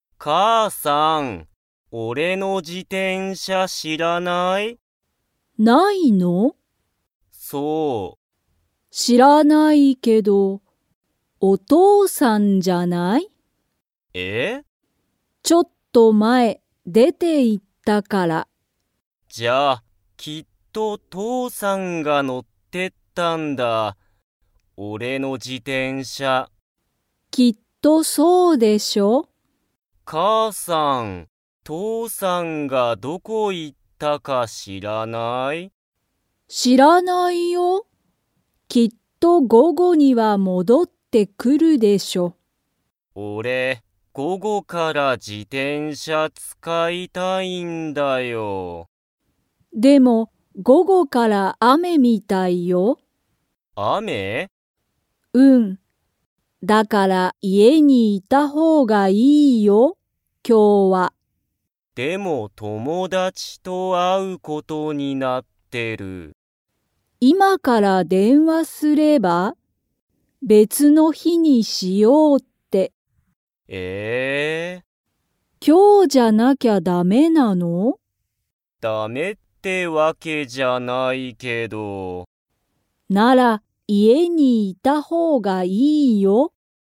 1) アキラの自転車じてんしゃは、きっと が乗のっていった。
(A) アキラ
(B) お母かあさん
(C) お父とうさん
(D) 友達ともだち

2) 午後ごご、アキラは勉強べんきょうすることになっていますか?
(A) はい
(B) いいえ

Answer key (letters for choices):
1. C
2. B

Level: Level 3